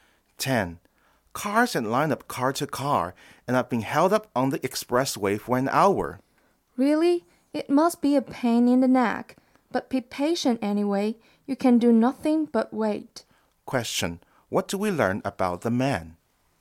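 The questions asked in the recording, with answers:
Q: What do we learn about the man?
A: He is stuck in a traffic jam on the expressway.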